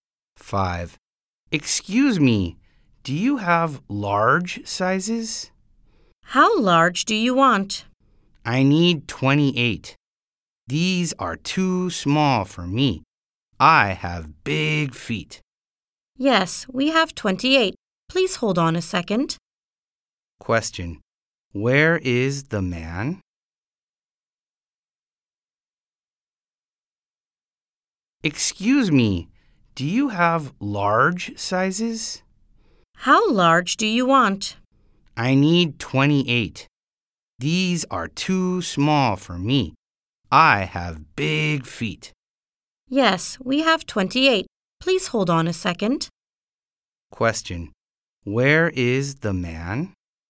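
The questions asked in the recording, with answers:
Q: Where is the man?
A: In a shoe store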